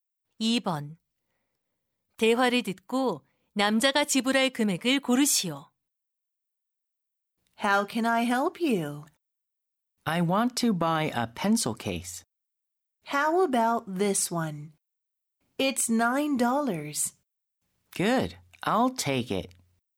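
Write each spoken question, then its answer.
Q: 대화를 듣고 남자가 지불할 금액을 고르시오.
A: 9달러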